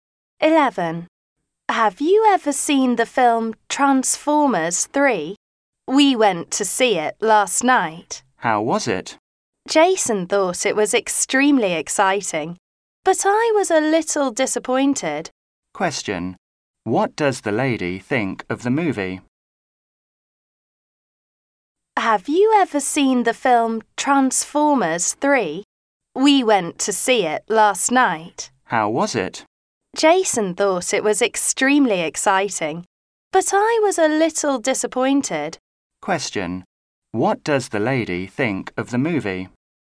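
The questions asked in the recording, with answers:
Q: What does the lady think of the movie?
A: She was a little disappointed with it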